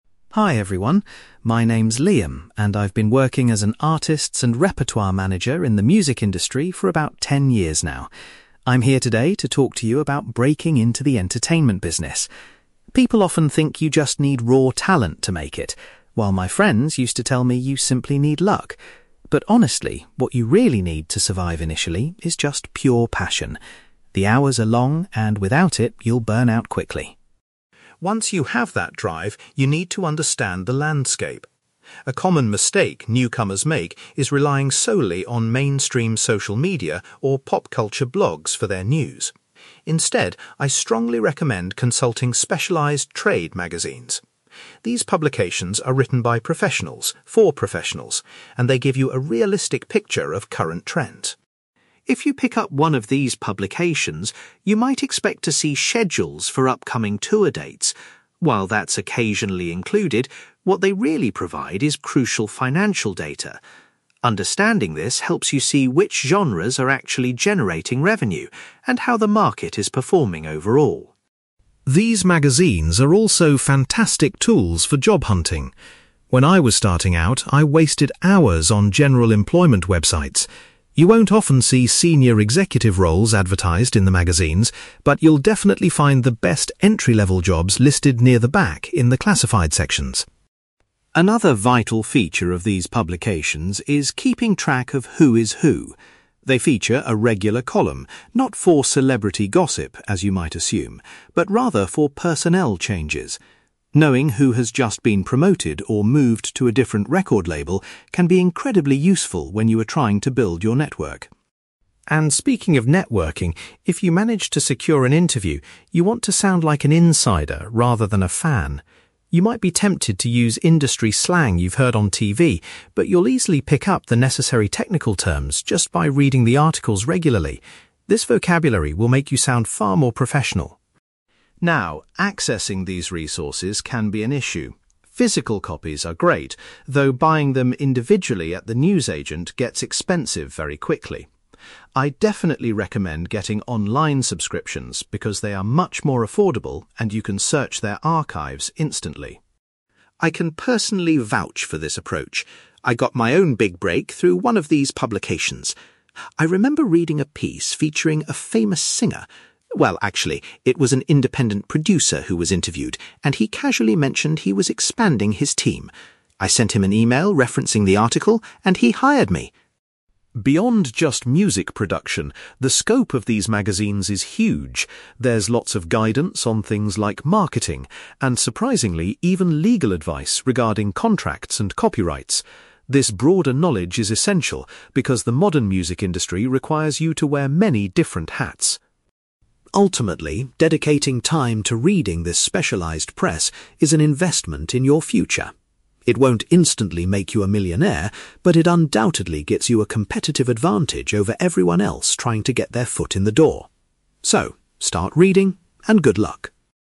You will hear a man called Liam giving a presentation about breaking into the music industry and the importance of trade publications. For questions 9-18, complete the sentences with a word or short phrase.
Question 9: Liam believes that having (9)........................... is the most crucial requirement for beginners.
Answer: passion

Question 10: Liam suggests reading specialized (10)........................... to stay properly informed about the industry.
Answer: trade magazines

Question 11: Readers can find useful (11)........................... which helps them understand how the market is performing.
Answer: financial data

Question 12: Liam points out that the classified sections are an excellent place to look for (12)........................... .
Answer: entry-level jobs

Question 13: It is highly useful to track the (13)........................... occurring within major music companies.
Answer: personnel changes

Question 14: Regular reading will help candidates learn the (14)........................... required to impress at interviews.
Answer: technical terms

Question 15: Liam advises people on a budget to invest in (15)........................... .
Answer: online subscriptions

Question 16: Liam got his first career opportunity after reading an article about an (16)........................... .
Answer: independent producer

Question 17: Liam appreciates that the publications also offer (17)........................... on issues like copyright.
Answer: legal advice

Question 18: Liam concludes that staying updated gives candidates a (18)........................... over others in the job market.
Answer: competitive advantage

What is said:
Liam: Hi everyone. My name is Liam, and I've been working as an Artists and Repertoire manager in the music industry for about ten years now. I'm here today to talk to you about breaking into the entertainment business. People often think you just need raw talent to make it, while my friends used to tell me you simply need luck. But honestly, what you really need to survive initially is just pure passion. The hours are long, and without it, you'll burn out quickly.
Once you have that drive, you need to understand the landscape. A common mistake newcomers make is relying solely on mainstream social media or pop culture blogs for their news. Instead, I strongly recommend consulting specialized trade magazines. These publications are written by professionals, for professionals, and they give you a realistic picture of current trends.
If you pick up one of these publications, you might expect to see schedules for upcoming tour dates. While that's occasionally included, what they really provide is crucial financial data. Understanding this helps you see which genres are actually generating revenue and how the market is performing overall.
These magazines are also fantastic tools for job hunting. When I was starting out, I wasted hours on general employment websites. You won't often see senior executive roles advertised in the magazines, but you'll definitely find the best entry-level jobs listed near the back in the classified sections.
Another vital feature of these publications is keeping track of who is who. They feature a regular column not for celebrity gossip, as you might assume, but rather for personnel changes. Knowing who has just been promoted or moved to a different record label can be incredibly useful when you are trying to build your network.
And speaking of networking, if you manage to secure an interview, you want to sound like an insider rather than a fan. You might be tempted to use industry slang you've heard on TV, but you'll easily pick up the necessary technical terms just by reading the articles regularly. This vocabulary will make you sound far more professional.
Now, accessing these resources can be an issue. Physical copies are great, though buying them individually at the newsagent gets expensive very quickly. I'd definitely recommend getting online subscriptions because they are much more affordable and you can search their archives instantly.
I can personally vouch for this approach. I got my own big break through one of these publications. I remember reading a piece featuring a famous singer. Well, actually, it was an independent producer who was interviewed, and he casually mentioned he was expanding his team. I sent him an email referencing the article, and he hired me!
Beyond just music production, the scope of these magazines is huge. There's lots of guidance on things like marketing, and surprisingly, even legal advice regarding contracts and copyrights. This broader knowledge is essential because the modern music industry requires you to wear many different hats.
Ultimately, dedicating time to reading this specialized press is an investment in your future. It won't instantly make you a millionaire, but it undoubtedly gives you a competitive advantage over everyone else trying to get their foot in the door. So, start reading, and good luck!

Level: B2